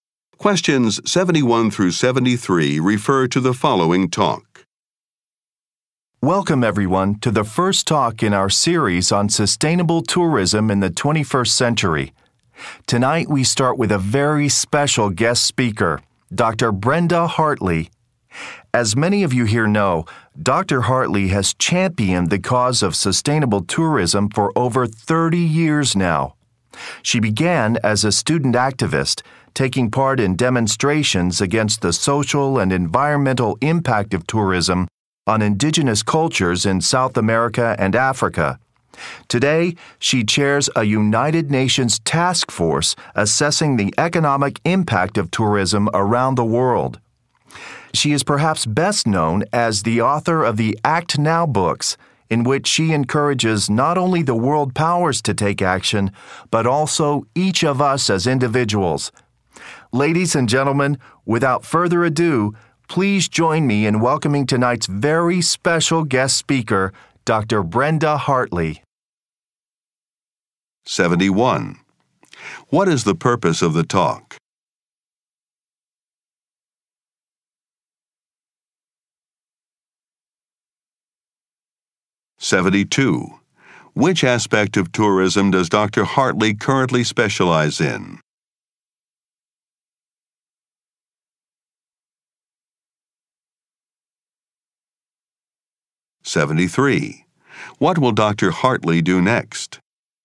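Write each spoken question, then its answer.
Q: What is the purpose of the talk?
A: To introduce a guest speaker, Dr. Brenda Hartley

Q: Which aspect of tourism does Dr.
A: The economic impact of tourism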